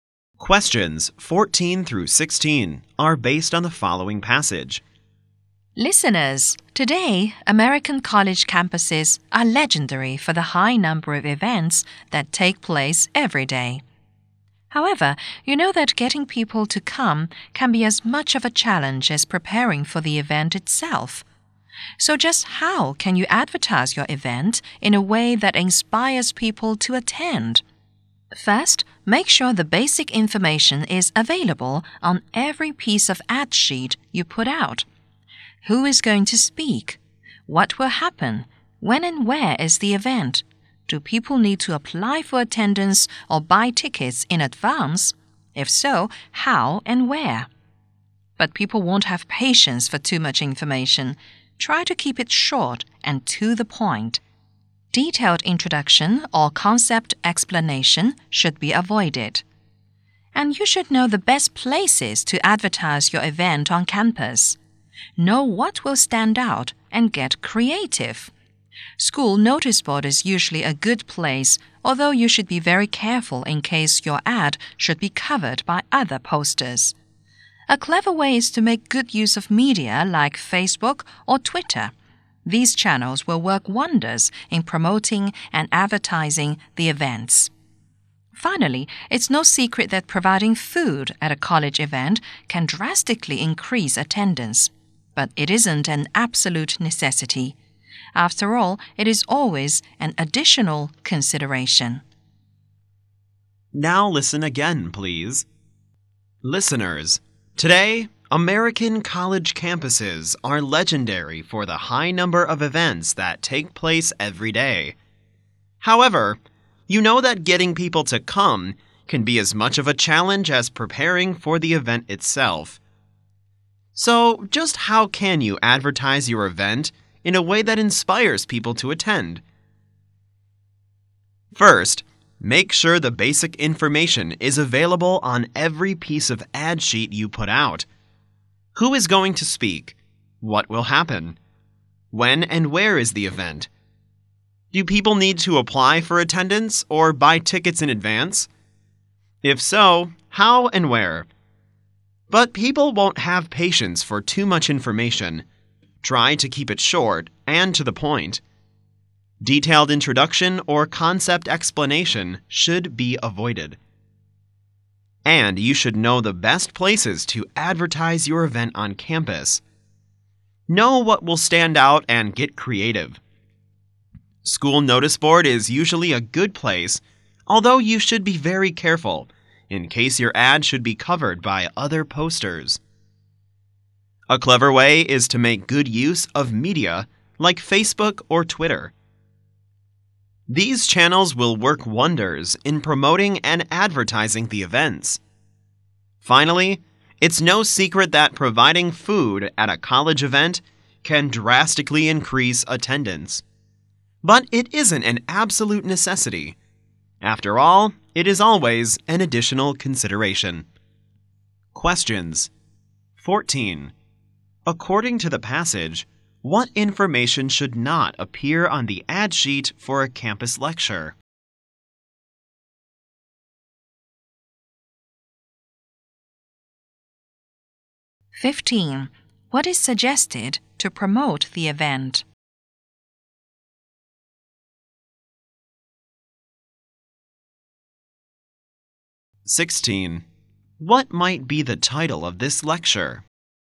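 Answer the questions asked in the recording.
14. Detailed introduction or concept explanation
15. Using media like Facebook or Twitter
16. How to advertise campus events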